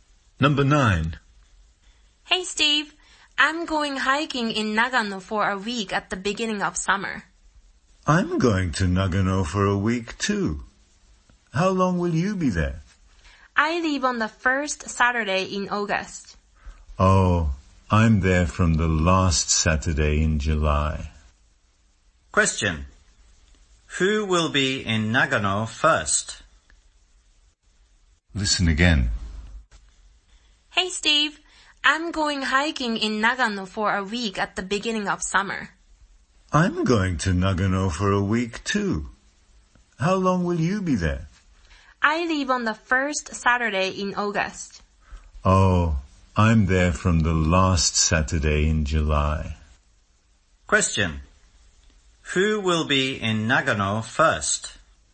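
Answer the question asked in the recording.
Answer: Steve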